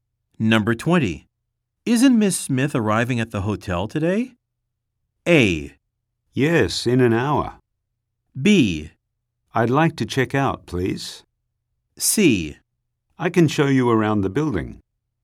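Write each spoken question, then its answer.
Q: Isn't Miss Smith arriving at the hotel today?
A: A: Yes, in an hour.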